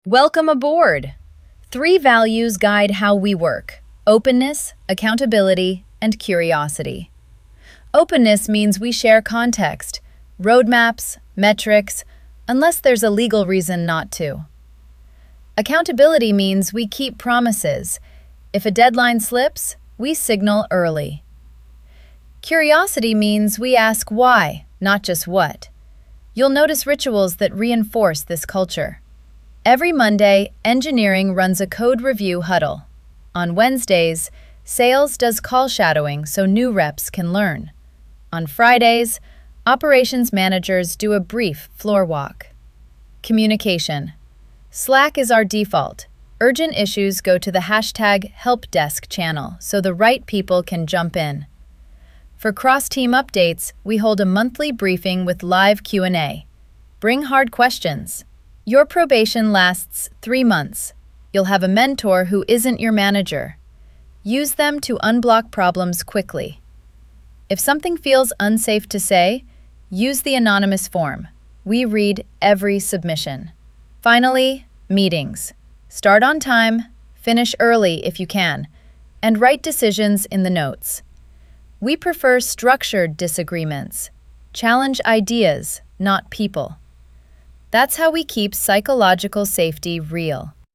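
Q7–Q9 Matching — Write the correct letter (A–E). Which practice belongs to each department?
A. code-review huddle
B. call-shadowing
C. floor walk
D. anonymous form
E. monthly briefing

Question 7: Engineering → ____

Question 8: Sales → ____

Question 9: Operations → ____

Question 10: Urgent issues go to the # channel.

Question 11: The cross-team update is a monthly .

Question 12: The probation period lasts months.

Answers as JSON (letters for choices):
{"7": "A", "8": "B", "9": "C", "10": "helpdesk", "11": "briefing", "12": "3"}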